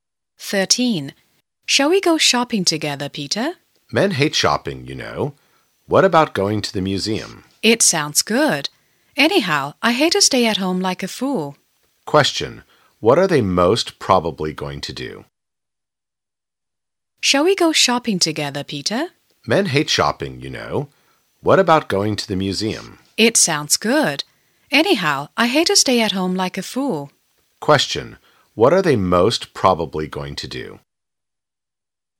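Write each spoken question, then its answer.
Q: what are they most probably going to do?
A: Go to the museum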